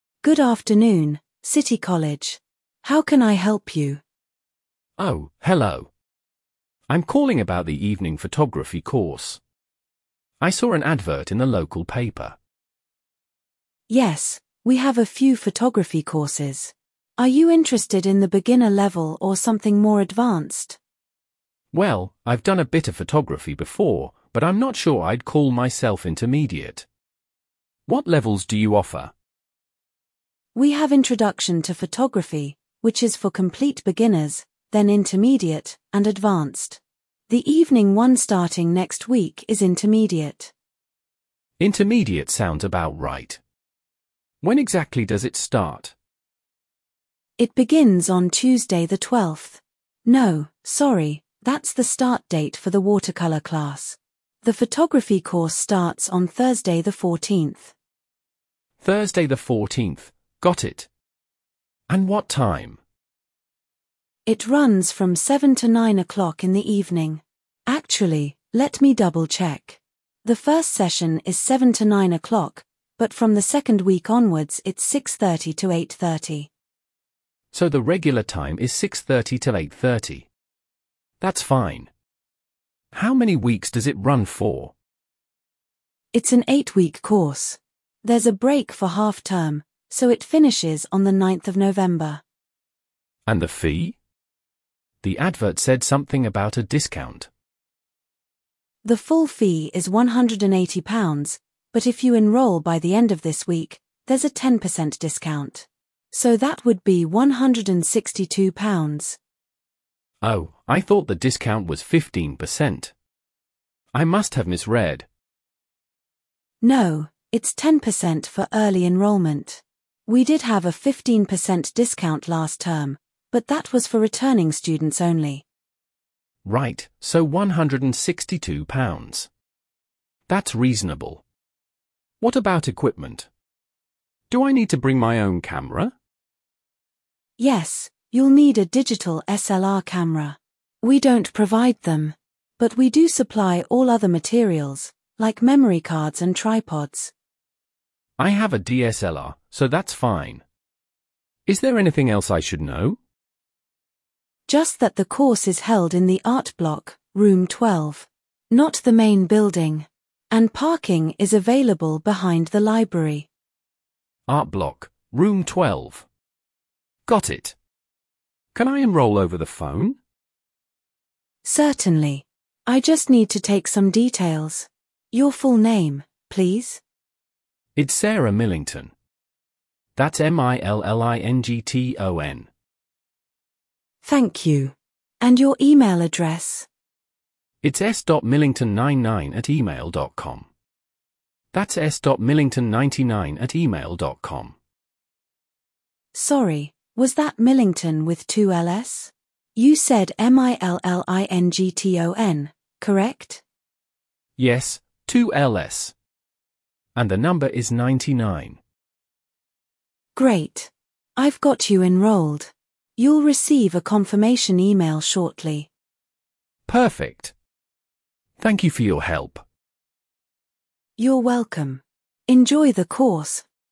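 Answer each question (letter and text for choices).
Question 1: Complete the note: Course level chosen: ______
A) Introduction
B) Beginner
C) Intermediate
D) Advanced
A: C) Intermediate

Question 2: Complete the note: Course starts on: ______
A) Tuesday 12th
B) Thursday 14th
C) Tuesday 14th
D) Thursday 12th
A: B) Thursday 14th

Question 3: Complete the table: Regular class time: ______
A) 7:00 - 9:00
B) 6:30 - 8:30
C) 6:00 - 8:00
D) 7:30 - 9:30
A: B) 6:30 - 8:30

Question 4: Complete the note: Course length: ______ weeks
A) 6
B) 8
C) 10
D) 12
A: B) 8

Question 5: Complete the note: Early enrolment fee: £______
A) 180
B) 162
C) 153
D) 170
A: B) 162

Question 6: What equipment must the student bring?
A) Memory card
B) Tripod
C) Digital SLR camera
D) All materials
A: C) Digital SLR camera

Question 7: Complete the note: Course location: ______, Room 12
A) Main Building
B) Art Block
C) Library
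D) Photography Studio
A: B) Art Block

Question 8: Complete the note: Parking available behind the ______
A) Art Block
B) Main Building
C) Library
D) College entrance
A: C) Library

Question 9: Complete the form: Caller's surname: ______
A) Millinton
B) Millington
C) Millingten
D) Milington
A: B) Millington

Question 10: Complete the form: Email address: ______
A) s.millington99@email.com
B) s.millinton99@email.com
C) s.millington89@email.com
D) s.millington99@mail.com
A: A) s.millington99@email.com

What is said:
Course Administrator: Good afternoon, City College. How can I help you?
Caller: Oh, hello. I'm calling about the evening photography course. I saw an advert in the local paper.
Course Administrator: Yes, we have a few photography courses. Are you interested in the beginner level or something more advanced?
Caller: Well, I've done a bit of photography before, but I'm not sure I'd call myself intermediate. 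What levels do you offer?
Course Administrator: We have Introduction to Photography, which is for complete beginners, then Intermediate, and Advanced. The evening one starting next week is Intermediate.
Caller: Intermediate sounds about right. When exactly does it start?
Course Administrator: It begins on Tuesday the 12th. No, sorry, that's the start date for the watercolour class. The photography course starts on Thursday the 14th.
Caller: Thursday the 14th. Got it. And what time?
Course Administrator: It runs from 7:00 to 9:00 in the evening. Actually, let me double-check. The first session is 7:00 to 9:00, but from the second week onwards it's 6:30 to 8:30.
Caller: So the regular time is 6:30 to 8:30. That's fine. How many weeks does it run for?
Course Administrator: It's an eight-week course. There's a break for half term, so it finishes on the 9th of November.
Caller: And the fee? The advert said something about a discount.
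Course Administrator: The full fee is £180, but if you enrol by the end of this week, there's a 10% discount. So that would be £162.
Caller: Oh, I thought the discount was 15%. I must have misread.
Course Administrator: No, it's 10% for early enrolment. We did have a 15% discount last term, but that was for returning students only.
Caller: Right, so £162. That's reasonable. What about equipment? Do I need to bring my own camera?
Course Administrator: Yes, you'll need a digital SLR camera. We don't provide them. But we do supply all other materials, like memory cards and tripods.
Caller: I have a DSLR, so that's fine. Is there anything else I should know?
Course Administrator: Just that the course is held in the Art Block, Room 12. Not the main building. And parking is available behind the library.
Caller: Art Block, Room 12. Got it. Can I enrol over the phone?
Course Administrator: Certainly. 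I just need to take some details. Your full name, please?
Course Administrator: Thank you. And your email address?
Caller: It's s.millington99@email.com. That's s dot millington99 at email dot com.
Course Administrator: Sorry, was that millington with two L's?
Caller: Yes, two L's. And the number is 99.
Course Administrator: Great. I've got you enrolled. You'll receive a confirmation email shortly.
Caller: Perfect. Thank you for your help.
Course Administrator: You're welcome. Enjoy the course!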